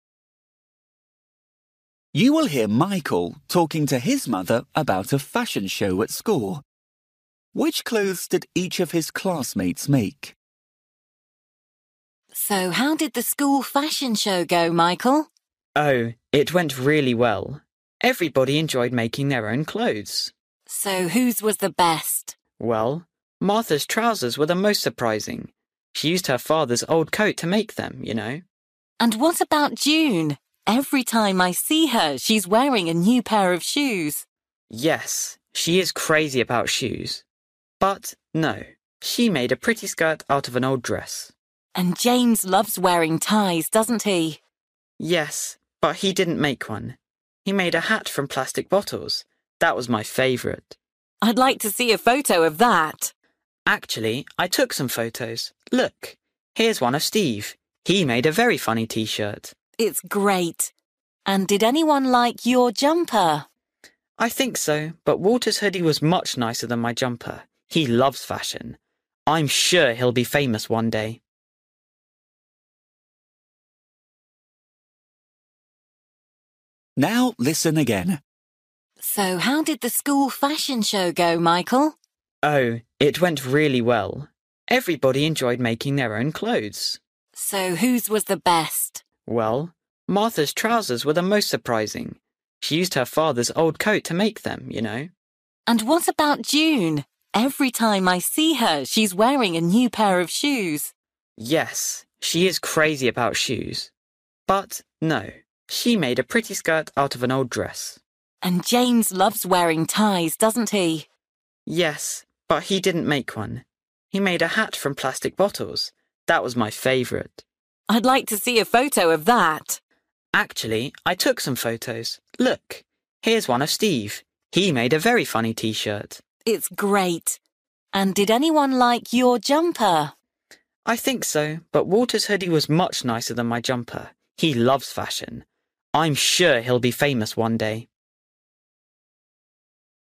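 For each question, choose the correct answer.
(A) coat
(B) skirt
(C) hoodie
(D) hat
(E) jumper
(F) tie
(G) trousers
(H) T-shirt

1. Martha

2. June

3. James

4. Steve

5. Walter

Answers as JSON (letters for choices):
{"1": "G", "2": "B", "3": "D", "4": "H", "5": "C"}

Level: Luyện nghe trình độ A2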